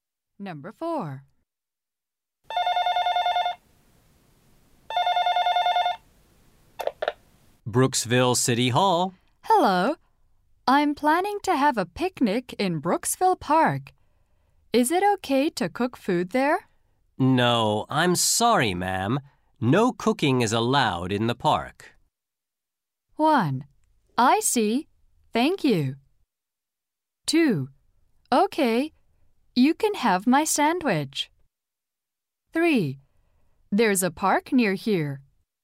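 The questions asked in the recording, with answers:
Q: No, I'm sorry, ma'am. No cooking is allowed in the park.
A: 1: I see. Thank you.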